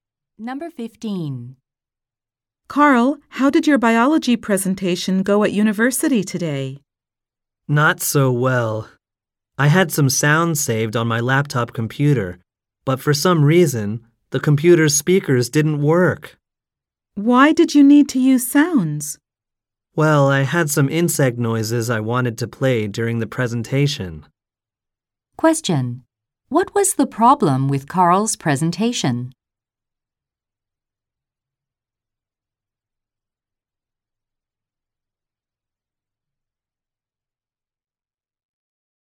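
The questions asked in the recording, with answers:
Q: What was the problem with Carl's presentation?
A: His laptop's speakers didn't work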